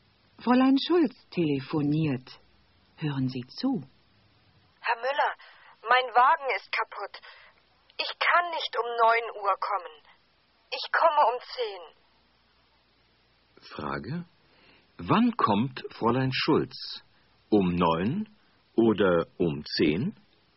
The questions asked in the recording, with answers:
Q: Wann kommt Fräulein Schulz?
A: Sie kommt um 10.